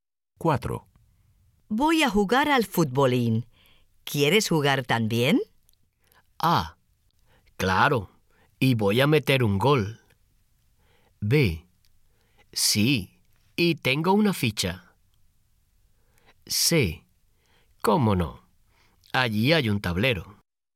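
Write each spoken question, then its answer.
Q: Voy a jugar al futbolín. ¿Quieres jugar también?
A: A: Claro, y voy a meter un gol.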